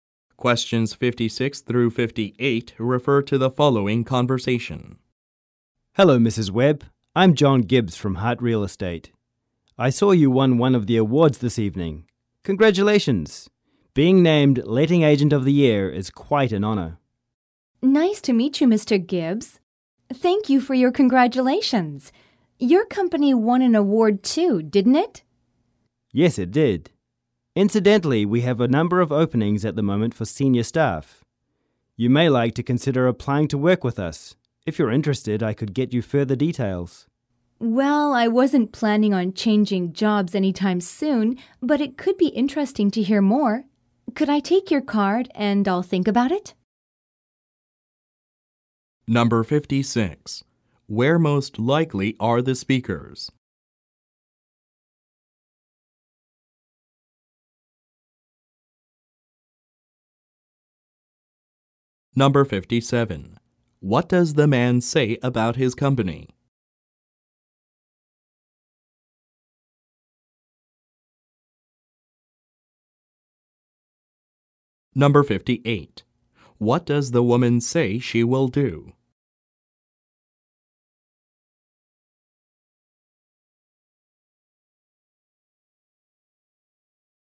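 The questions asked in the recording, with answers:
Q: Where most likely are the speakers?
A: At an awards ceremony

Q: What does the man say about his company?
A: It has openings for senior staff

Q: What does the woman say she will do?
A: Take his card and think about the offer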